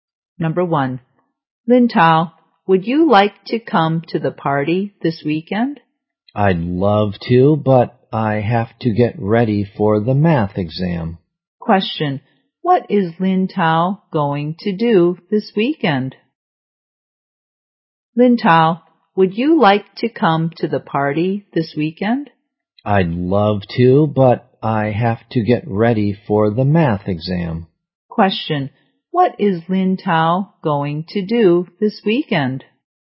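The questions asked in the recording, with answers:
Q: Question, what is Lin Tao going to do this weekend?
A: Get ready for the math exam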